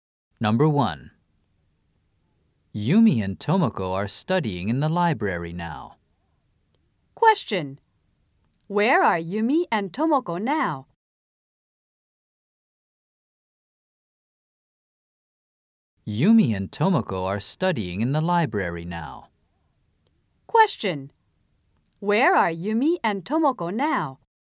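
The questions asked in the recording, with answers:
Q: Where are Yumi and Tomoko now?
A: In the library.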